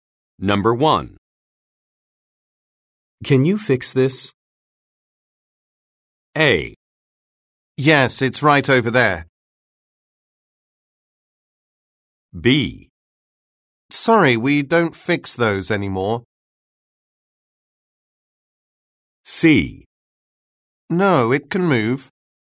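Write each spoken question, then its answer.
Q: Can you fix this?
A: B: Sorry, we don't fix those anymore.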